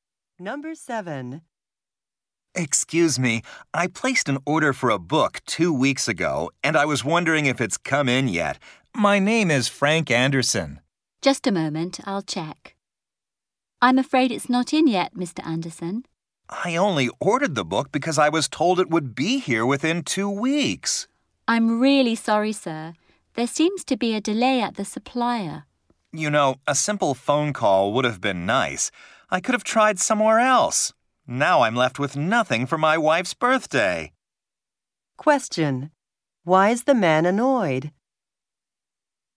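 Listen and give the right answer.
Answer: Nobody called to tell him the book was delayed, and now he has no gift for his wife's birthday.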